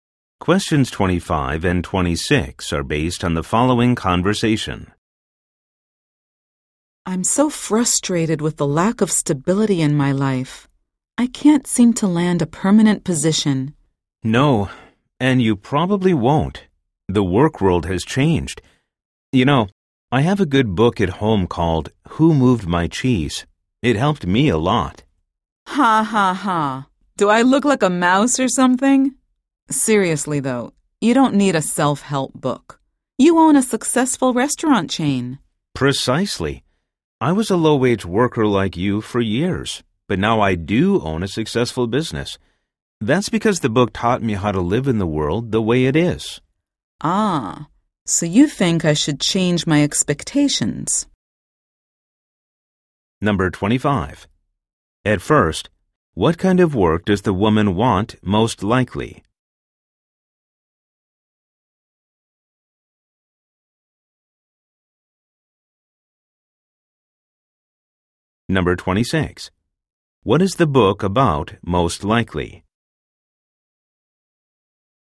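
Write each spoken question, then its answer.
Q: At first, what kind of work does the woman want most likely?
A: A permanent position

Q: What is the book about most likely?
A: Adapting to change in the world as it is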